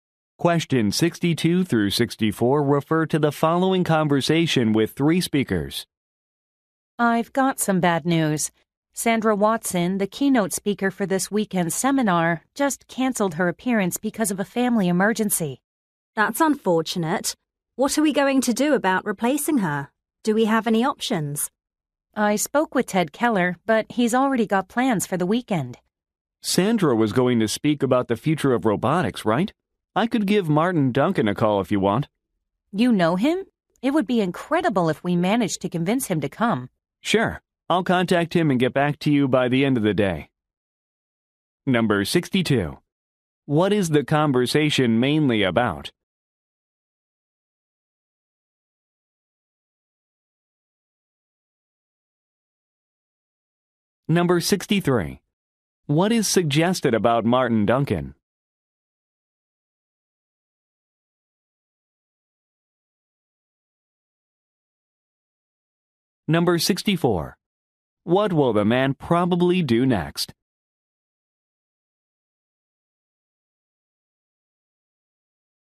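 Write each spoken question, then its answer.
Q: What is the conversation mainly about?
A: Replacing a keynote speaker who canceled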